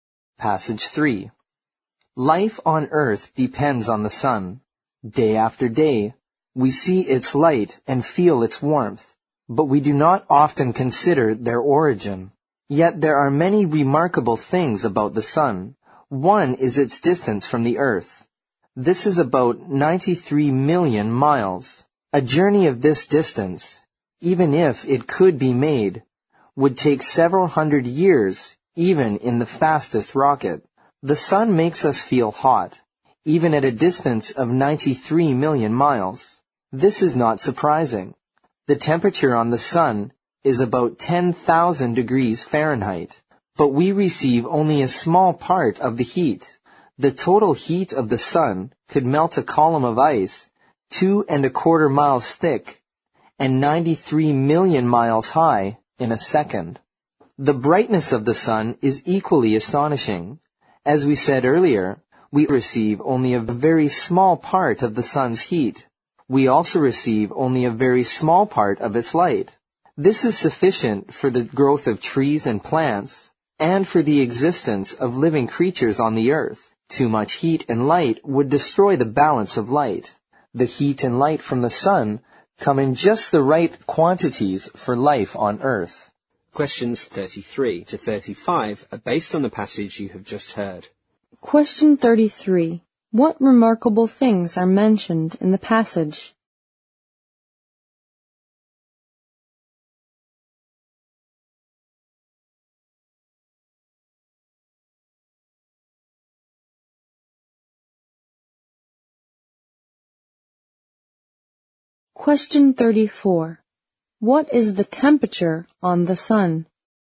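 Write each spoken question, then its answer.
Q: What remarkable things are mentioned in the passage?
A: The sun's distance from the earth, its heat and its brightness

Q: What is the temperature on the sun?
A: About 10,000 degrees Fahrenheit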